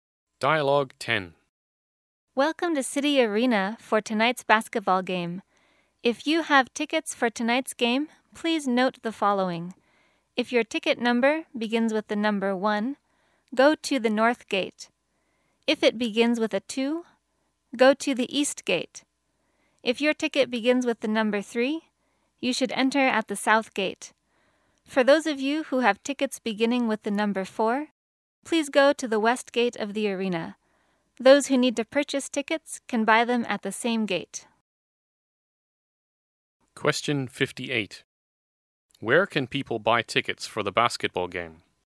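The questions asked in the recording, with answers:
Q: Where can people buy tickets for the basketball game?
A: At the same gate they enter by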